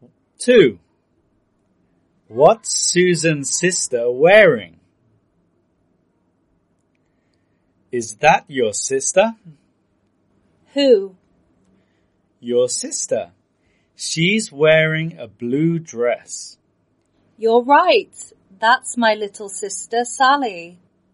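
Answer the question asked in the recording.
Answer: A blue dress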